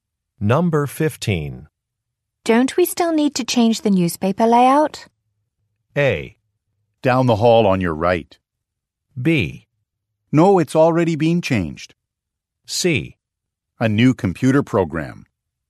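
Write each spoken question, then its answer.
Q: Don't we still need to change the newspaper layout?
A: B: No, it's already been changed.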